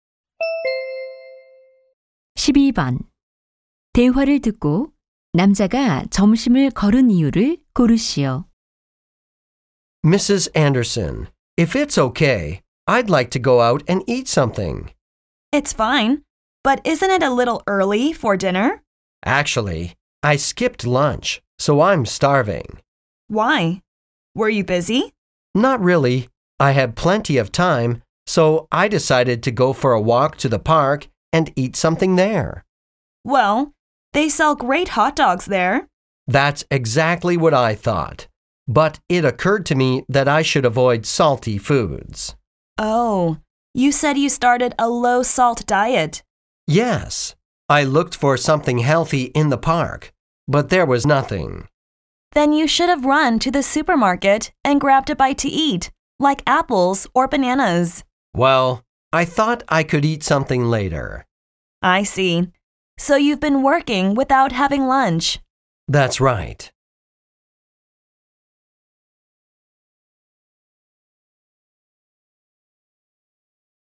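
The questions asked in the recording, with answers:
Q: 대화를 듣고 남자가 점심을 거른 이유를 고르시오.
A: 저염식 중이라 공원에서 먹을 건강한 음식이 없어서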